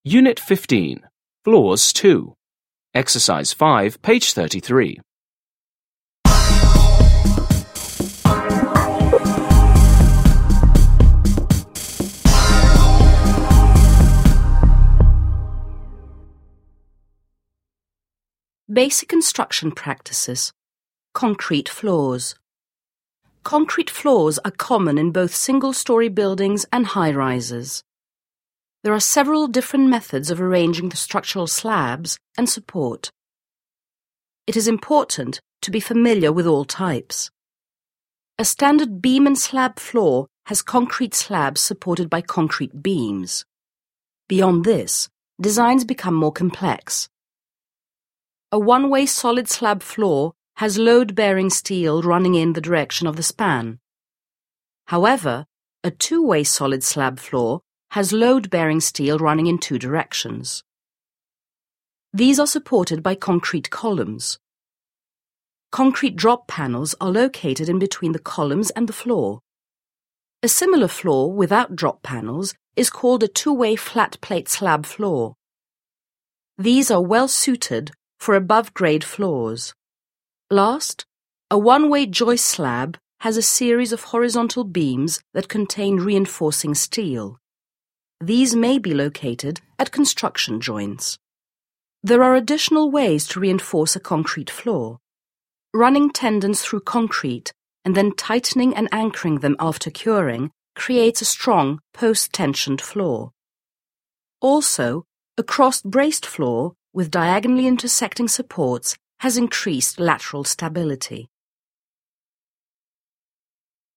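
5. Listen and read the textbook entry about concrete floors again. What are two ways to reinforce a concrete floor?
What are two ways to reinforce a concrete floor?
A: post-tensioning (tendons tightened and anchored) and cross-bracing

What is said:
Unit 15. Floors 2.
BASIC CONSTRUCTION PRACTICES
Concrete floors
Concrete floors are common in both single story buildings and high-rises. There are several different methods of arranging the structural slabs and support. It is important to be familiar with all types.
A standard beam-and-slab floor has concrete slabs supported by concrete beams. Beyond this, designs become more complex. A one-waysolid slab floor has load-bearing steel running in the direction of the span. These are supported by concrete columns. Concrete drop panels are located in between the columns and the floor. A similar floor without drop panels is called a two-way flat plate slab floor. 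These are well-suited for above grade floors. Last, a one-way joist slab has a series of horizontal beams that contain reinforcing steel. These may be located at construction joints.
There are additional ways to reinforce a concrete floor. Running tendons through concrete, and then tightening and anchoring them after curing creates a strong post-tensioned floor. Also, a cross-braced floor, with diagonally intersecting supports, has increased lateral stability.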